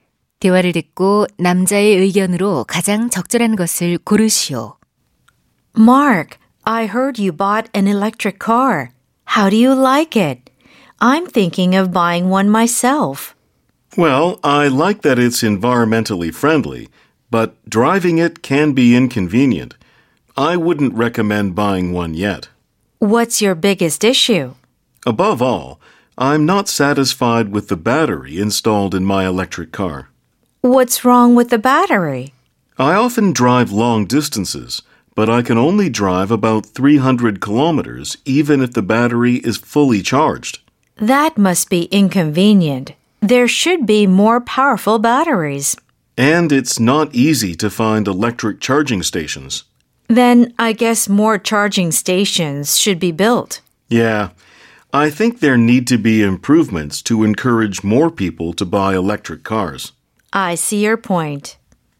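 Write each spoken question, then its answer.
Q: 대화를 듣고 남자의 의견으로 가장 적절한 것을 고르시오.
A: 전기차 구매를 늘리려면 배터리와 충전소 등의 개선이 필요하다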